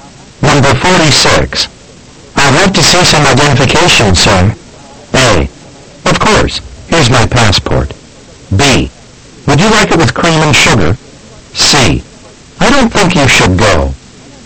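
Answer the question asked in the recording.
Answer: A: Of course. Here's my passport.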